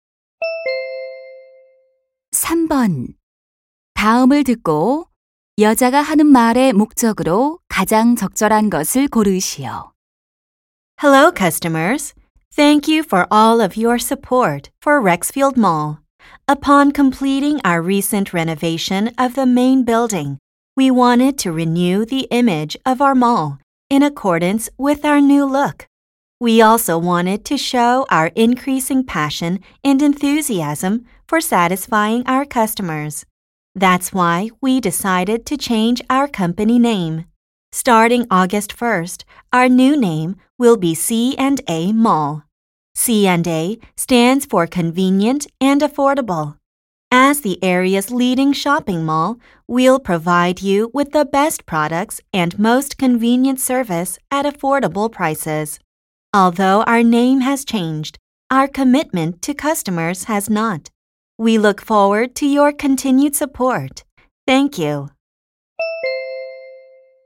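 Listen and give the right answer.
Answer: 쇼핑몰 회사명 변경을 알리려고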